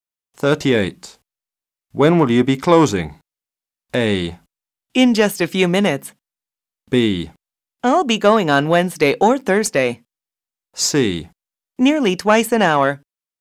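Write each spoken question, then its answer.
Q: When will you be closing?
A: A: In just a few minutes.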